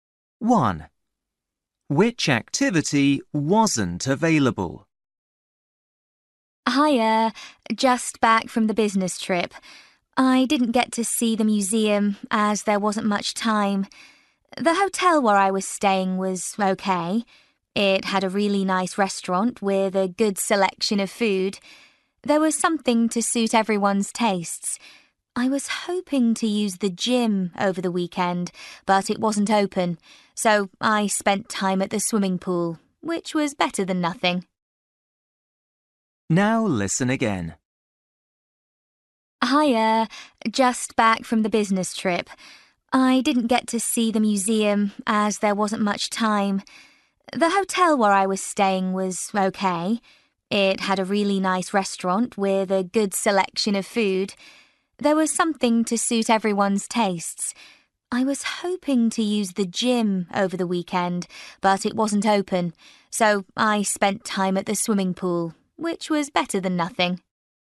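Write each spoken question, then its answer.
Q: Which activity wasn't available?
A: the gym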